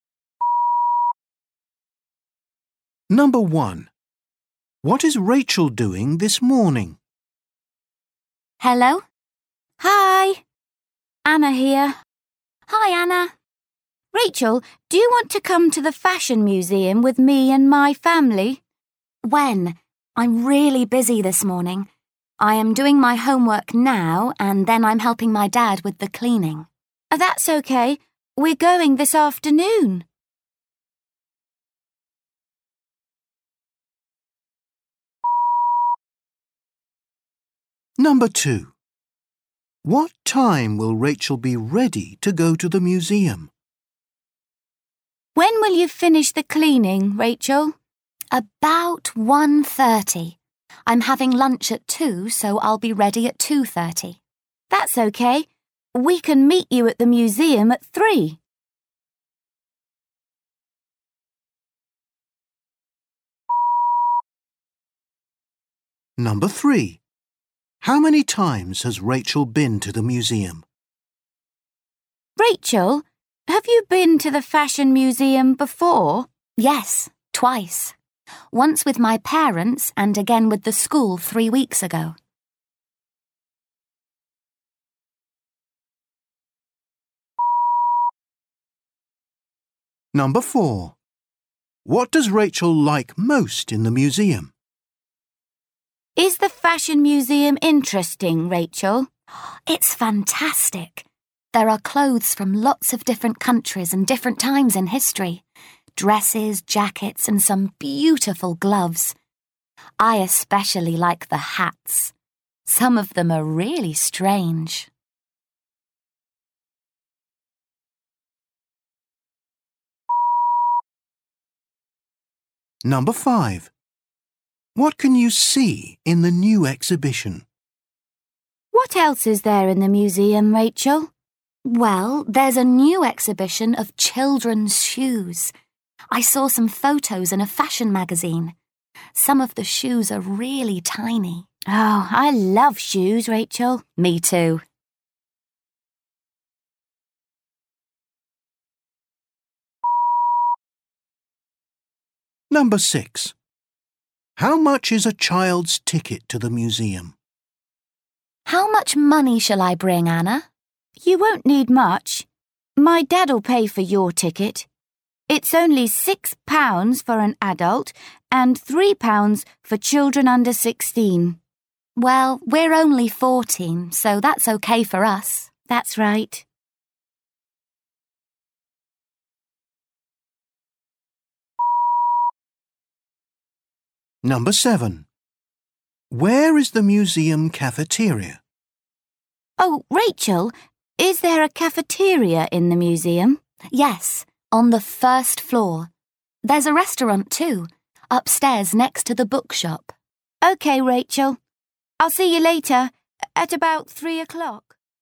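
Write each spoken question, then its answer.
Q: What is Rachel doing this morning?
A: Her homework, then helping her dad with the cleaning

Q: What time will Rachel be ready to go to the museum?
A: 2:30

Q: How many times has Rachel been to the museum?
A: Twice

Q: What does Rachel like most in the museum?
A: The hats

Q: What can you see in the new exhibition?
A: Children's shoes

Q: Where is the museum cafeteria?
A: On the first floor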